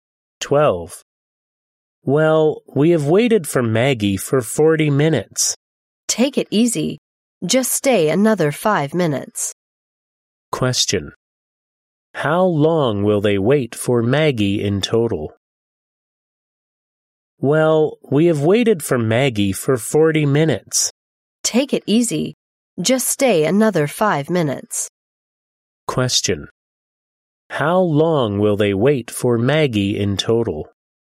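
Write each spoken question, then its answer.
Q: How long will they wait for Maggie in total?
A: 45 minutes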